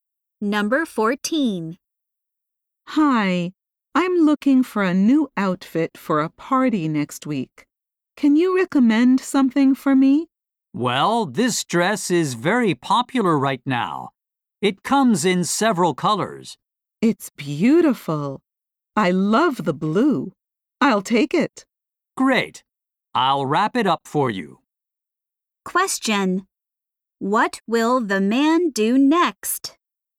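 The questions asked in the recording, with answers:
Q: What will the man do next?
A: Wrap up the dress.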